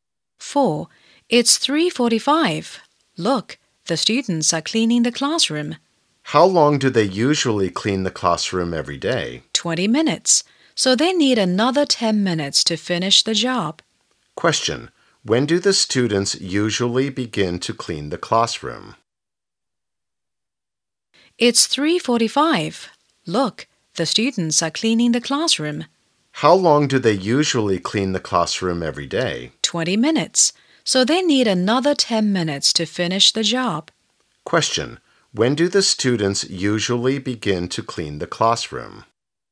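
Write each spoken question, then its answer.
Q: When do the students usually begin to clean the classroom?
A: At 3:35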